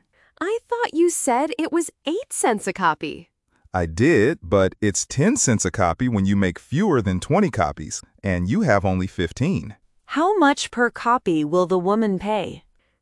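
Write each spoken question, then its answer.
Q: How much per copy will the woman pay?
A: 10 cents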